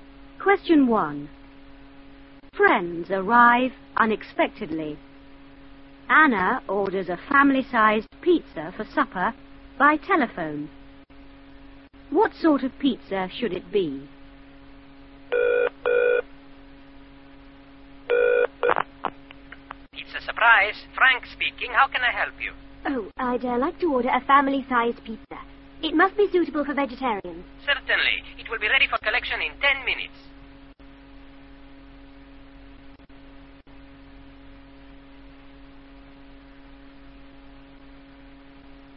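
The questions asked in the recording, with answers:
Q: What sort of pizza should it be?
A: Family-sized and suitable for vegetarians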